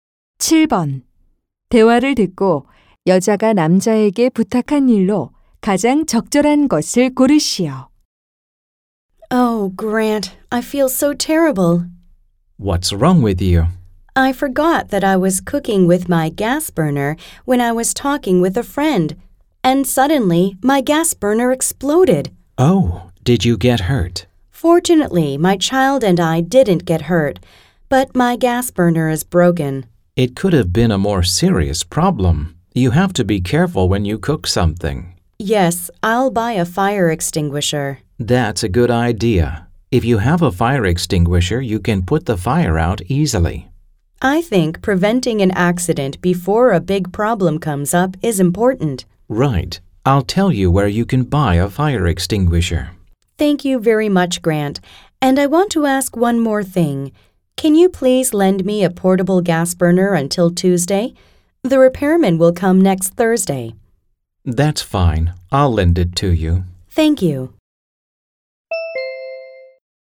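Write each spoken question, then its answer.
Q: 대화를 듣고 여자가 남자에게 부탁한 일로 가장 적절한 것을 고르시오.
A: 휴대용 가스버너 빌려주기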